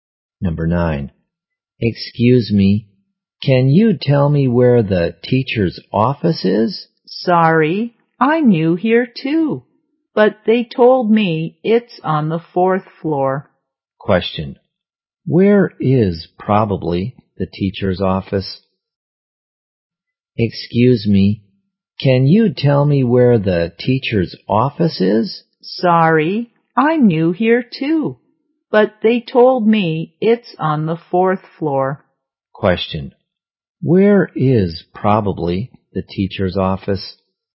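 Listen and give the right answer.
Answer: On the fourth floor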